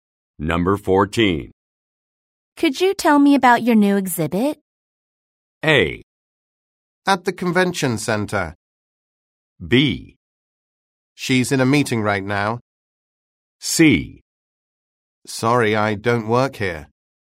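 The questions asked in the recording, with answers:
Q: Could you tell me about your new exhibit?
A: C: Sorry, I don't work here.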